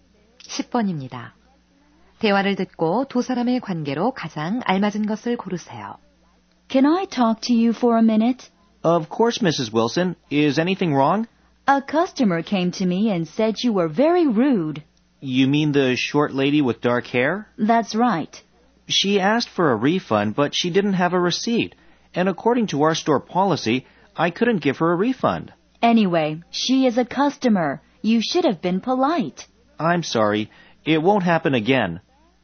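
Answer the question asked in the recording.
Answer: 매장 관리자와 점원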